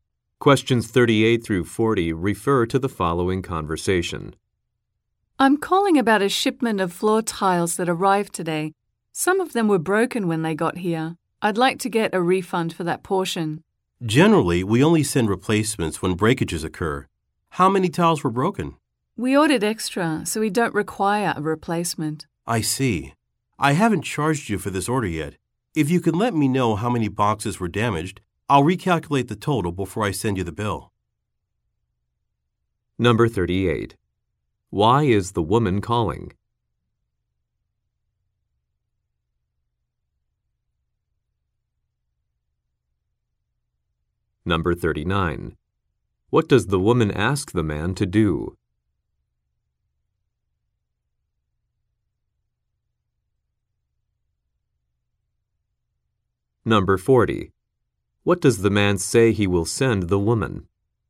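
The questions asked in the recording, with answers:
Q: Why is the woman calling?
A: To get a refund for broken tiles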